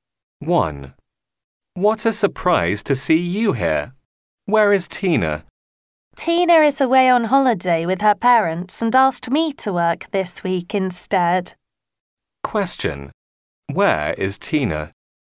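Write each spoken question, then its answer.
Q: Where is Tina?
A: On holiday with her parents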